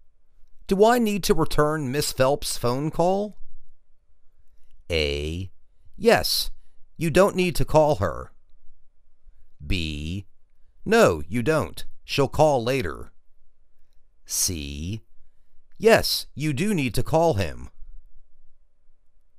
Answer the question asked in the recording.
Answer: No, you don't. She'll call later.